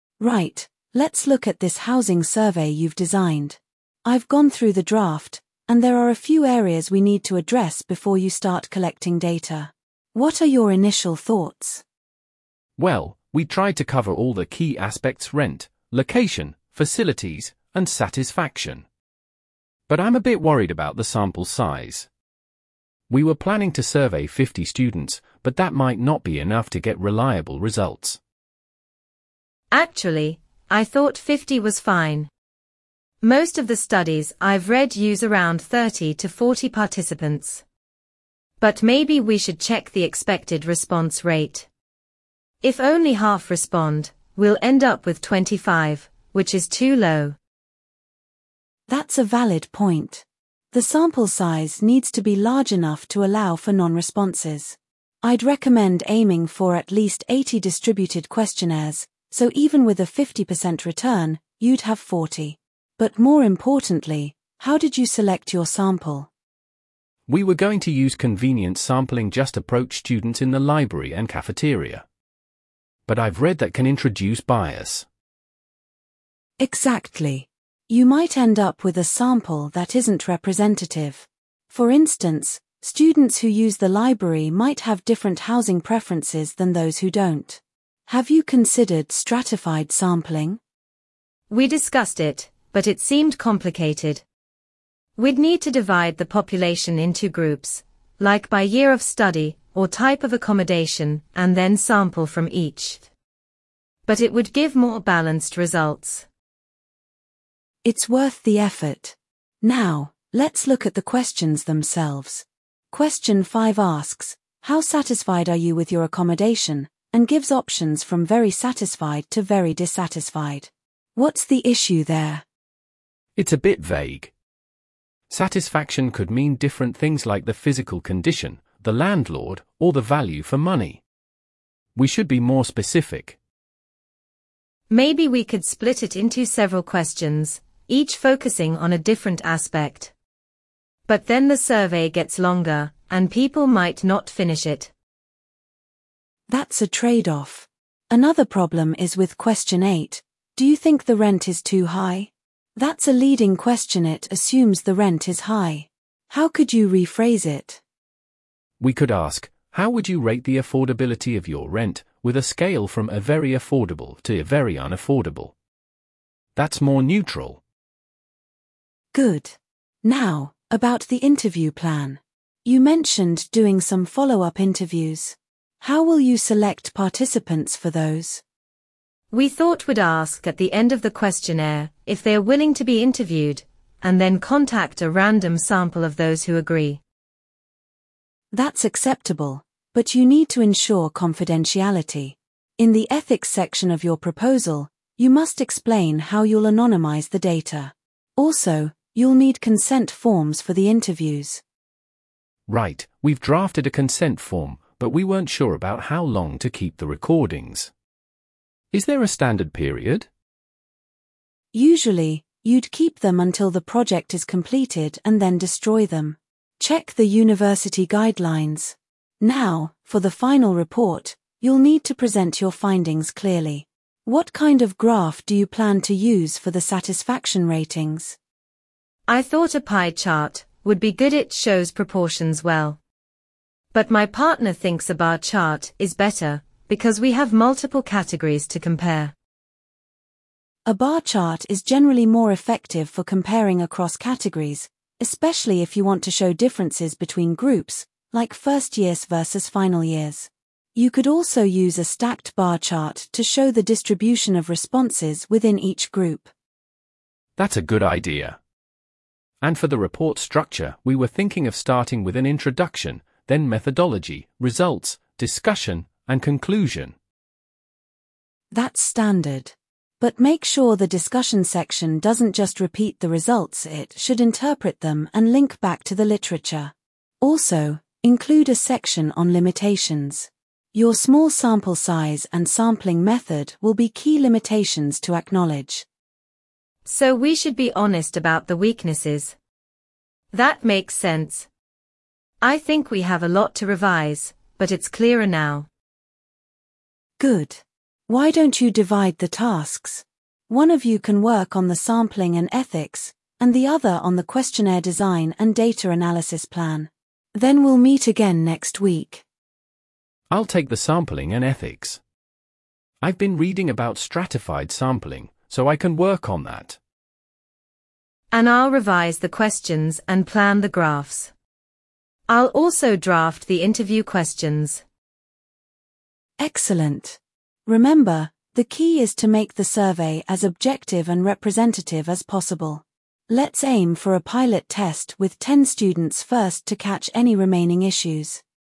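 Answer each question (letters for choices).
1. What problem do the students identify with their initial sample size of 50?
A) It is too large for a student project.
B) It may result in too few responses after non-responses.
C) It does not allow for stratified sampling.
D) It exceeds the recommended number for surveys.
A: B

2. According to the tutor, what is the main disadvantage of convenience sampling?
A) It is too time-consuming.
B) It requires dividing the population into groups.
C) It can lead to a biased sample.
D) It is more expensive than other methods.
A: C

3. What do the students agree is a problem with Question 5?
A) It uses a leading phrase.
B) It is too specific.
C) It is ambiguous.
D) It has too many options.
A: C

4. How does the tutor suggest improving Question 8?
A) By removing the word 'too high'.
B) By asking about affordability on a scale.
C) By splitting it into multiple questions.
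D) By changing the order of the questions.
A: B

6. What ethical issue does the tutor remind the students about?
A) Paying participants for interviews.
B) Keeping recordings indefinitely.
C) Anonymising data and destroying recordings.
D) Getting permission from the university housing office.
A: C

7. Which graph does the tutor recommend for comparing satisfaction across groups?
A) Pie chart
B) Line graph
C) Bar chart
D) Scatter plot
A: C

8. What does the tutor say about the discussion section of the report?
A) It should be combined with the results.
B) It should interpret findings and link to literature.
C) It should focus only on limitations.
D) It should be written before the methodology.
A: B

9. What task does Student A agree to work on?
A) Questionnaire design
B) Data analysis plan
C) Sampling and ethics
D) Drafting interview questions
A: C

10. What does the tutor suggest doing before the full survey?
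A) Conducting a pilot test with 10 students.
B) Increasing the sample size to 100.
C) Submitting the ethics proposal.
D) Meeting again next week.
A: A

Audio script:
Tutor: Right, let's look at this housing survey you've designed. I've gone through the draft, and there are a few areas we need to address before you start collecting data. What are your initial thoughts?
Student A: Well, we tried to cover all the key aspects-rent, location, facilities, and satisfaction. But I'm a bit worried about the sample size. We were planning to survey 50 students, but that might not be enough to get reliable results.
Student B: Actually, I thought 50 was fine. Most of the studies I've read use around 30 to 40 participants. But maybe we should check the expected response rate. If only half respond, we'll end up with 25, which is too low.
Tutor: That's a valid point. The sample size needs to be large enough to allow for non-responses. 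I'd recommend aiming for at least 80 distributed questionnaires, so even with a 50% return, you'd have 40. But more importantly, how did you select your sample?
Student A: We were going to use convenience sampling-just approach students in the library and cafeteria. But I've read that can introduce bias.
Tutor: Exactly. You might end up with a sample that isn't representative. For instance, students who use the library might have different housing preferences than those who don't. Have you considered stratified sampling?
Student B: We discussed it, but it seemed complicated. We'd need to divide the population into groups, like by year of study or type of accommodation, and then sample from each. But it would give more balanced results.
Tutor: It's worth the effort. Now, let's look at the questions themselves. Question 5 asks: 'How satisfied are you with your accommodation?' and gives options from 'very satisfied' to 'very dissatisfied'. 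What's the issue there?
Student A: It's a bit vague. Satisfaction could mean different things-like the physical condition, the landlord, or the value for money. We should be more specific.
Student B: Maybe we could split it into several questions, each focusing on a different aspect. But then the survey gets longer, and people might not finish it.
Tutor: That's a trade-off. Another problem is with Question 8: 'Do you think the rent is too high?' That's a leading question-it assumes the rent is high. How could you rephrase it?
Student A: We could ask: 'How would you rate the affordability of your rent?' with a scale from 'very affordable' to 'very unaffordable'. That's more neutral.
Tutor: Good. Now, about the interview plan. You mentioned doing some follow-up interviews. How will you select participants for those?
Student B: We thought we'd ask at the end of the questionnaire if they're willing to be interviewed, and then contact a random sample of those who agree.
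Tutor: That's acceptable, but you need to ensure confidentiality. In the ethics section of your proposal, you must explain how you'll anonymise the data. Also, you'll need consent forms for the interviews.
Student A: Right, we've drafted a consent form, but we weren't sure about how long to keep the recordings. Is there a standard period?
Tutor: Usually, you'd keep them until the project is completed and then destroy them. Check the university guidelines. Now, for the final report, you'll need to present your findings clearly. What kind of graph do you plan to use for the satisfaction ratings?
Student B: I thought a pie chart would be good-it shows proportions well. But my partner thinks a bar chart is better because we have multiple categories to compare.
Tutor: A bar chart is generally more effective for comparing across categories, especially if you want to show differences between groups, like first-years versus final-years. 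You could also use a stacked bar chart to show the distribution of responses within each group.
Student A: That's a good idea. And for the report structure, we were thinking of starting with an introduction, then methodology, results, discussion, and conclusion.
Tutor: That's standard. But make sure the discussion section doesn't just repeat the results-it should interpret them and link back to the literature. Also, include a section on limitations. Your small sample size and sampling method will be key limitations to acknowledge.
Student B: So we should be honest about the weaknesses. That makes sense. I think we have a lot to revise, but it's clearer now.
Tutor: Good. Why don't you divide the tasks? One of you can work on the sampling and ethics, and the other on the questionnaire design and data analysis plan.
Student A: I'll take the sampling and ethics. I've been reading about stratified sampling, so I can work on that.
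Student B: And I'll revise the questions and plan the graphs. I'll also draft the interview questions.
Tutor: Excellent. Remember, the key is to make the survey as objective and representative as possible. Let's aim for a pilot test with 10 students first to catch any remaining issues.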